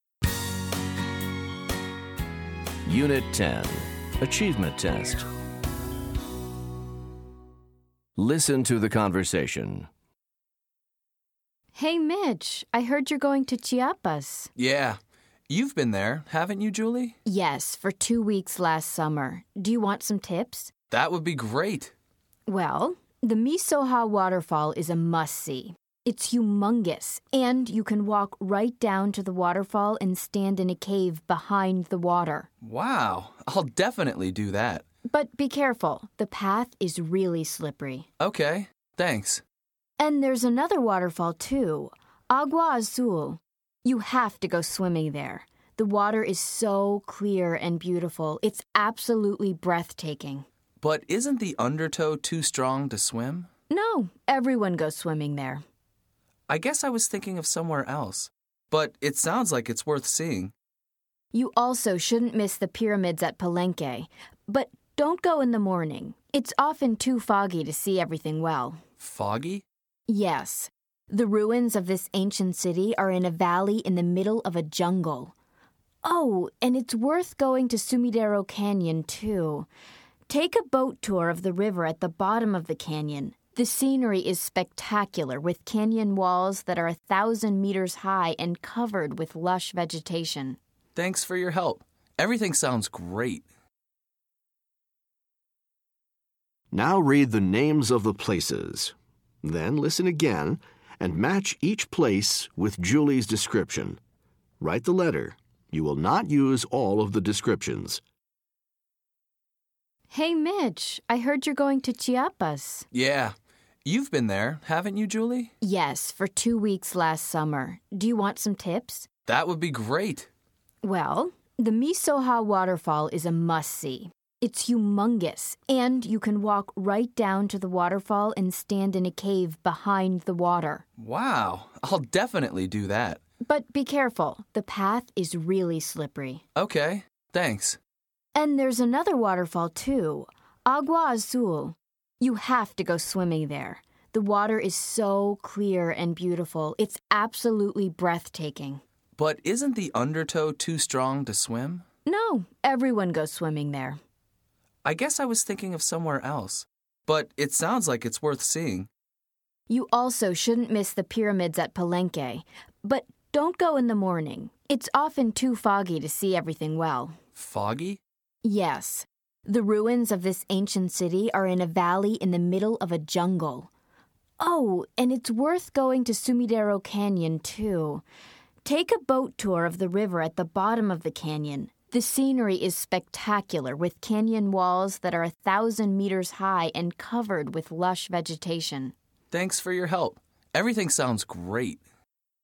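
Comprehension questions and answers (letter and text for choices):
Listen to the conversation. Read the names of the places. Then match each place with Julie's description by dragging and dropping them to the blank fields.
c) is breathtaking.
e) is in the jungle.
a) has spectacular scenery.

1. Agua Azul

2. Palenque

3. Sumidero Canyon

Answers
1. c) is breathtaking.
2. e) is in the jungle.
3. a) has spectacular scenery.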